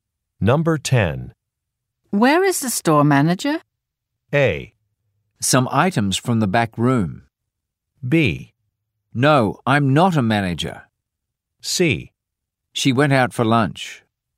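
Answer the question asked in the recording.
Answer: C: She went out for lunch.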